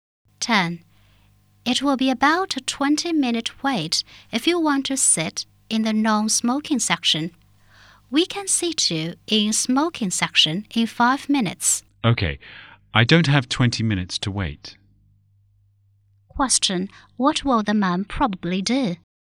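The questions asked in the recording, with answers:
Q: What will the man probably do?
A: Sit in the smoking section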